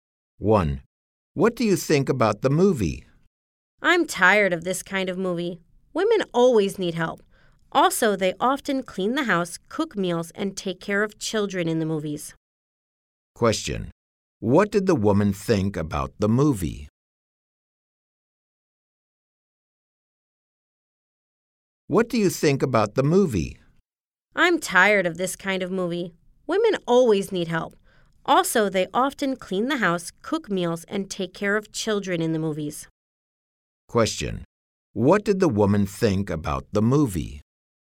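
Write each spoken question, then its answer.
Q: What did the woman think about the movie?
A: She was tired of that kind of movie.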